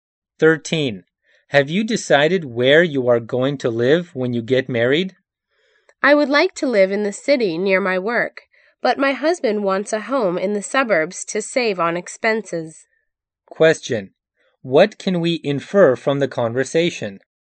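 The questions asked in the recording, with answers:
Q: What can we infer from the conversation?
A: The woman and her husband disagree about where to live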